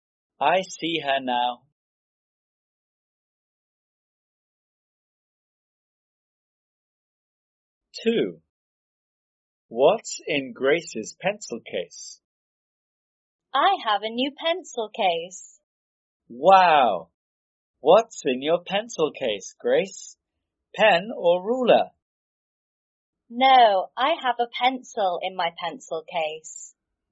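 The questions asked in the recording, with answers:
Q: What's in Grace's pencil case?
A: A pencil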